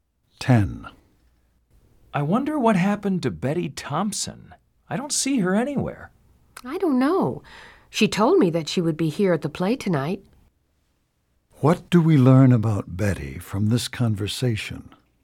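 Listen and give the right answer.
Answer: She said she would come to the play but isn't there.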